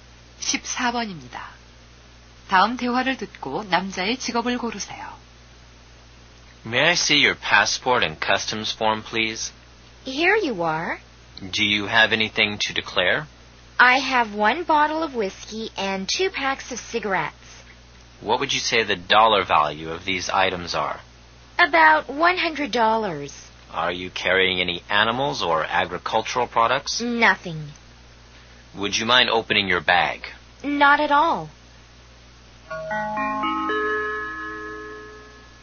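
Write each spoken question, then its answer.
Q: 다음 대화를 듣고 남자의 직업을 고르세요.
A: 세관원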